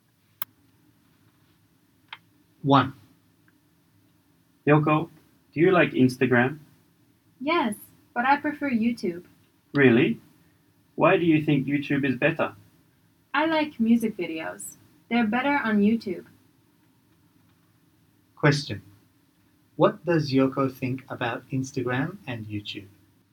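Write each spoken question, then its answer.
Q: What does Yoko think about Instagram and YouTube?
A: She prefers YouTube because music videos are better on it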